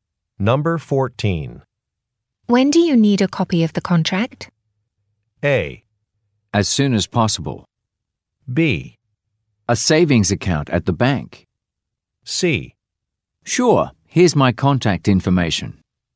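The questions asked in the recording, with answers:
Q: When do you need a copy of the contract?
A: A: As soon as possible.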